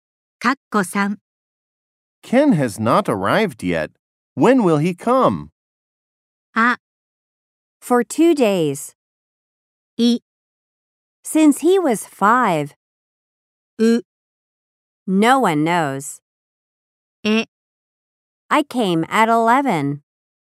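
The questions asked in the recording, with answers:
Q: Ken has not arrived yet. When will he come?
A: う: No one knows.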